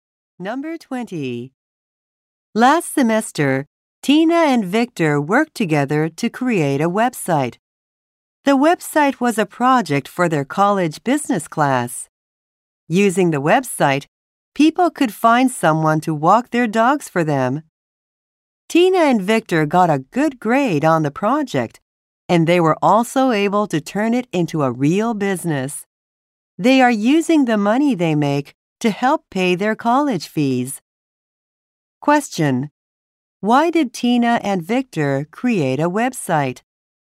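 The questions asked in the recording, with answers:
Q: Why did Tina and Victor create a website?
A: For a college business class project.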